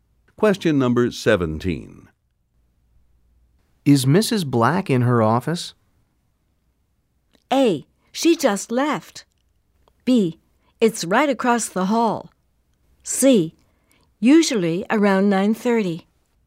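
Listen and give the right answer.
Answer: A: She just left.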